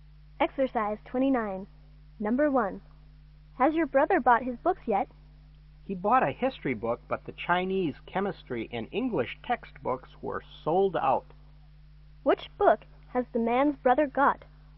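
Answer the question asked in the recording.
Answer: A history book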